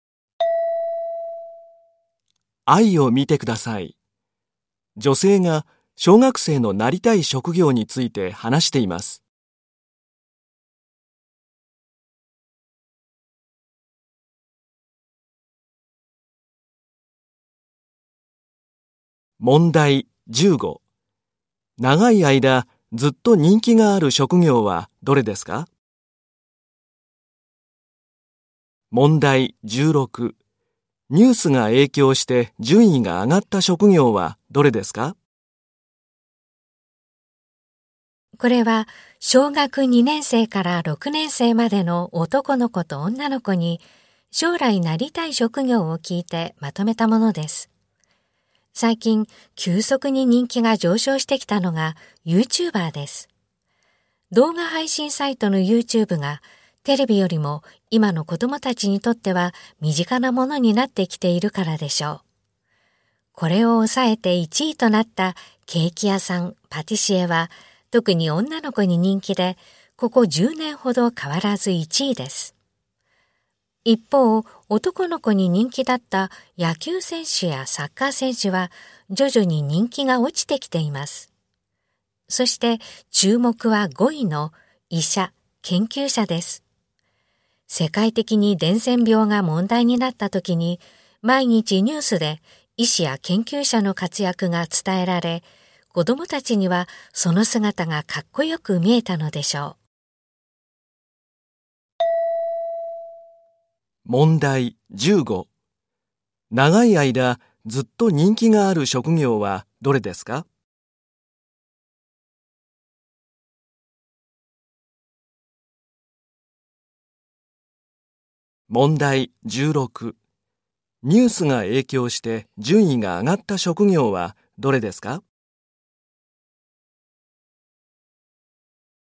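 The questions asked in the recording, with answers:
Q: 長い間ずっと人気がある職業はどれですか?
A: ケーキ屋さん(パティシエ)

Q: ニュースが影響して順位が上がった職業はどれですか?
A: 医者・研究者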